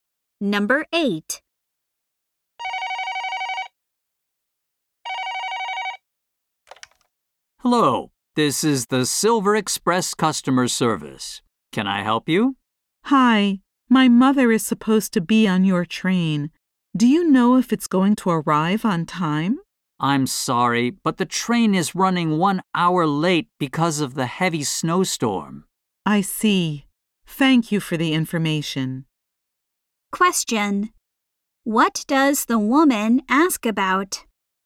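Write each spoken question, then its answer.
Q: What does the woman ask about?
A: Whether the train will arrive on time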